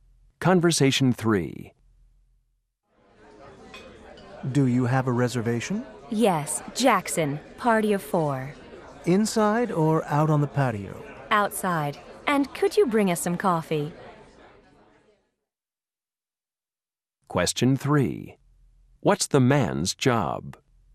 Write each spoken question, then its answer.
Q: What's the man's job?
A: I'm the host.